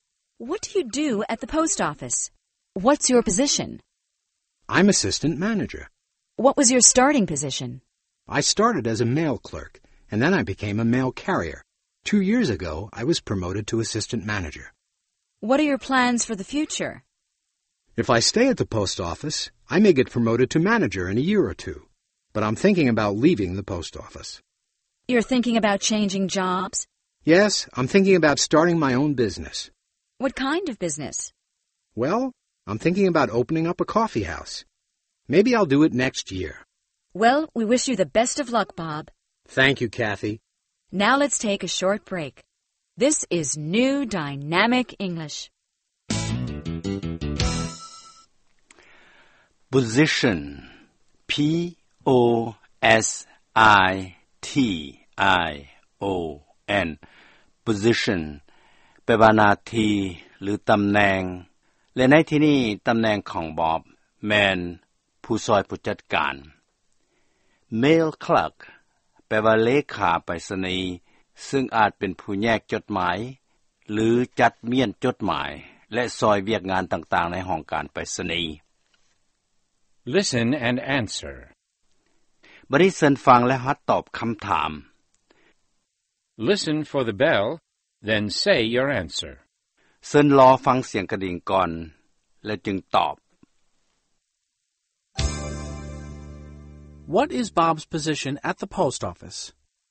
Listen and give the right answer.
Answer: He's assistant manager.